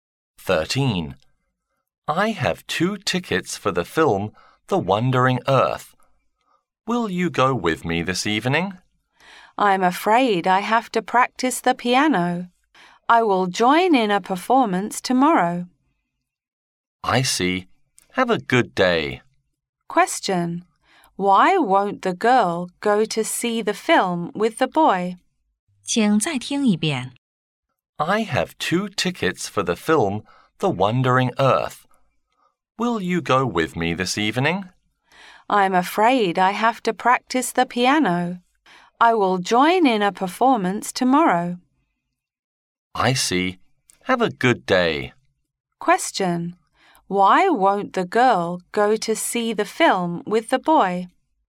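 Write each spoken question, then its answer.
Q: Why won't the girl go to see the film with the boy?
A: She has to practice the piano for a performance tomorrow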